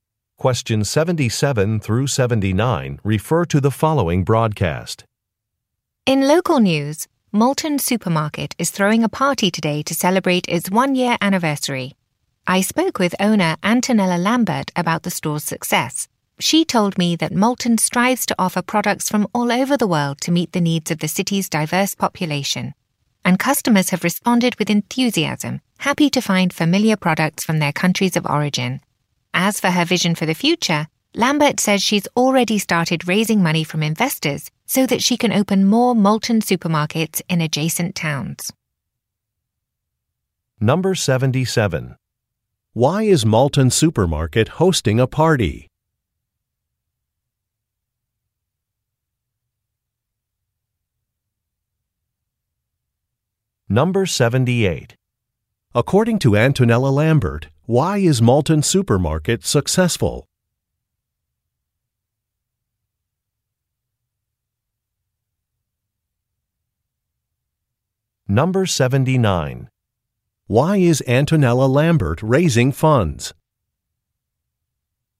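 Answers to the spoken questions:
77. To celebrate its one-year anniversary
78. It offers products from all over the world
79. To open more stores in nearby towns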